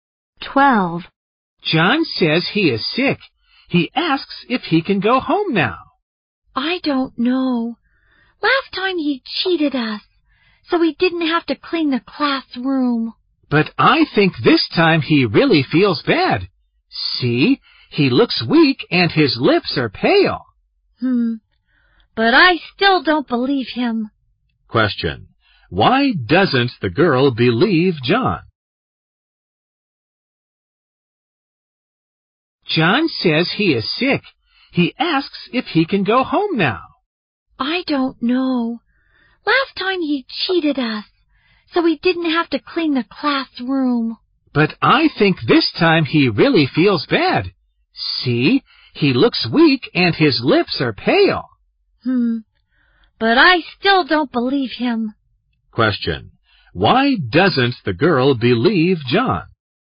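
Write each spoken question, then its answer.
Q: Why doesn't the girl believe John?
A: Last time he cheated them so he didn't have to clean the classroom.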